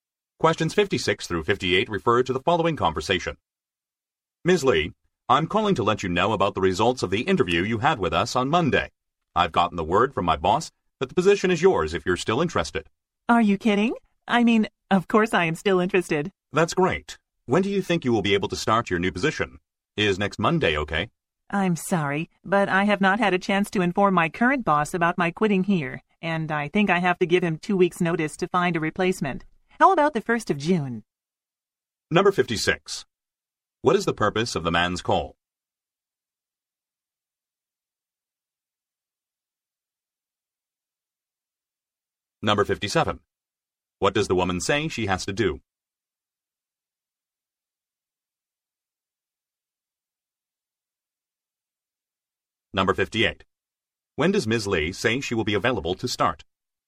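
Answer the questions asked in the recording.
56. To offer Ms. Lee the position she interviewed for
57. Give her current boss 2 weeks' notice
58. The 1st of June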